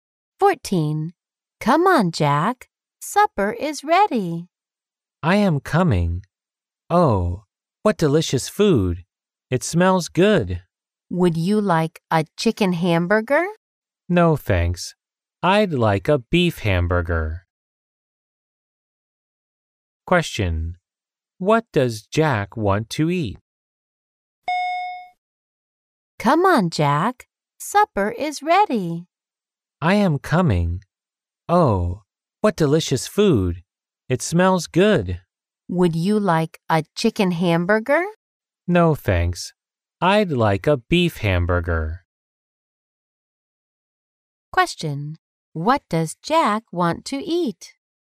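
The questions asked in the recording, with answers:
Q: What does Jack want to eat?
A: A beef hamburger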